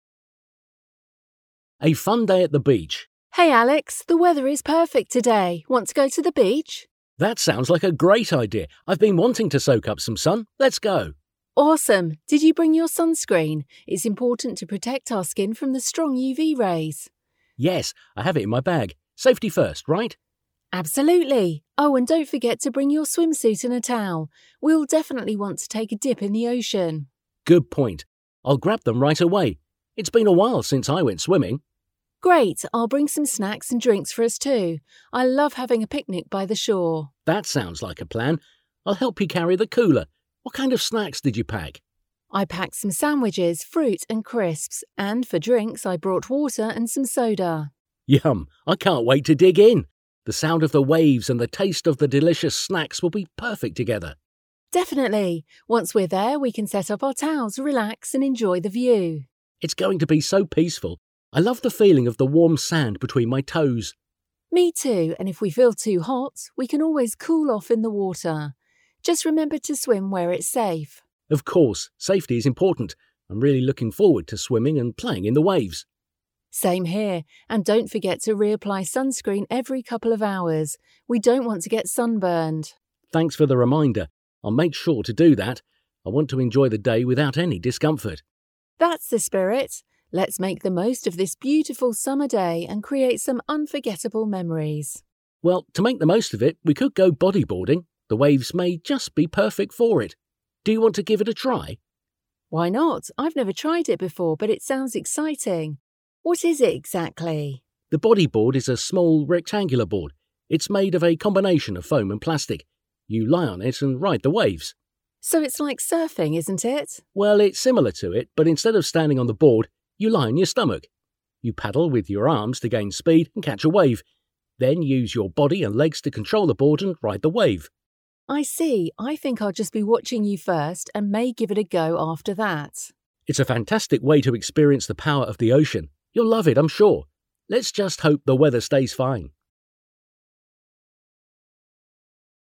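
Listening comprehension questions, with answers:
Fill in the gaps with information from the dialogue.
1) Alex wants to go to the beach .........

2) In order to keep himself safe he ..........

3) Emily reminded him to ..........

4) It's a long time since he last ..........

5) He likes the idea of ...........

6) He thinks .......... are a perfect combination.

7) They both love ...........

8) To avoid any discomfort Alex will ..........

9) A bodyboard is .......... board made of ...........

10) Bodyboarding is similar to surfing but instead of ..........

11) To gain speed on the bodyboard you can ..........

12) You can control the board .........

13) Alex thinks bodyboarding is a fantastic way to ..........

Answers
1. to soak up some sun
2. has sunscreen in his bag
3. bring his swimsuit and a towel
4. went swimming
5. having a picnic by the shore
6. the sound of the waves and the taste of the delicious snacks
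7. the feeling of the warm sand between their toes
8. reapply sunscreen every couple of hours
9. a small rectangular; a combination of foam and plastic
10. standing on the board, you lie on your stomach
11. paddle with your arms
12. with your body and legs
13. experience the power of the ocean

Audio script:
A Fun Day at the Beach
Emily: Hey Alex, the weather is perfect today! Want to go to the beach?
Alex: That sounds like a great idea! I've been wanting to soak up some sun. Let's go!
E: Awesome! Did you bring your sunscreen? It's important to protect our skin from the strong UV rays.
A: Yes, I have it in my bag. Safety first, right?
E: Absolutely! Oh, and don't forget to bring your swimsuit and a towel. We'll definitely want to take a dip in the ocean.
A: Good point! I'll grab them right away. It's been a while since I went swimming.
E: Great! I'll bring some snacks and drinks for us too. 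I love having a picnic by the shore.
I'll help you carry the cooler. What kind of snacks did you pack?
E: I packed some sandwiches, fruit, and crisps. And for drinks, I brought water and some soda.
A: Yum! I can't wait to dig in. The sound of the waves and the taste of the delicious snacks will be perfect together.
E: Definitely! Once we're there, we can set up our towels, relax, and enjoy the view.
A: It's going to be so peaceful. I love the feeling of the warm sand between my toes.
E: Me too! And if we feel too hot, we can always cool off in the water. Just remember to swim where it's safe.
A: Of course, safety is important. I'm really looking forward to swimming and playing in the waves.
E: Same here! And don't forget to reapply sunscreen every couple of hours. We don't want to get sunburned.
A: Thanks for the reminder. I'll make sure to do that. I want to enjoy the day without any discomfort.
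E: That's the spirit! Let's make the most of this beautiful summer day and create some unforgettable memories.
A: Well, to make the most of it, we could do bodyboarding. The waves may just be perfect for it. Do you want to give it a try?
E: Why not? I've never tried it before, but it sounds exciting. What is it exactly?
A: The bodyboard is a small, rectangular board. It's made of a combination of foam and plastic. You lie on it and ride the waves.
E: So it's like surfing, isn't it?
A: Well, it's similar to it, but instead of standing on the board, you lie on your stomach. You paddle with your arms to gain speed and catch a wave, then use your body and legs to control the board and ride the wave.
E: I see. I think I'll be just watching you first and may give it a go after that.
A: It's a fantastic way to experience the power of the ocean. You'll love it, I'm sure. Let's just hope the weather stays fine.

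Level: Középfok (B2)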